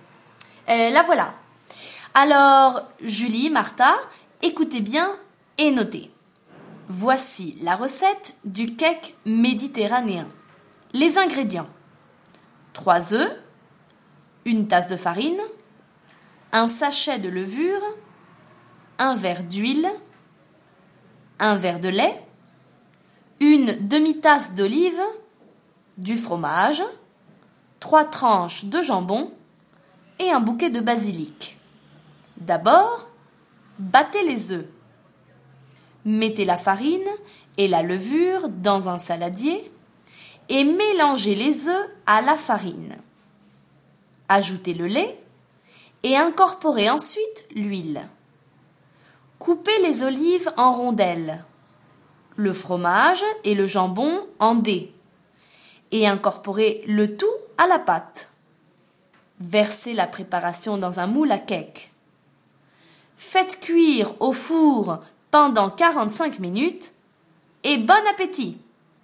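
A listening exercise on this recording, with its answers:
Et maintenant, complétez la recette du cake méditerranéen :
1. Les ingrédients : trois , une tasse de farine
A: œufs

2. une demi-tasse d'olives, du , trois tranches de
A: fromage

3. trois tranches de et un bouquet de basilic.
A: jambon

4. D'abord, les œufs.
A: battez

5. Mettez la farine et la levure dans un saladier et les œufs à la farine.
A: mélangez

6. le lait et incorporez ensuite l'huile.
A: Ajoutez

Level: FR1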